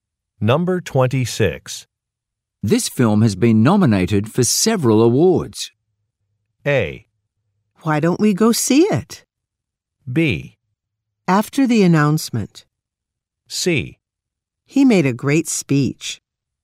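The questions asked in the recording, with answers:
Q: This film has been nominated for several awards.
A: A: Why don't we go see it?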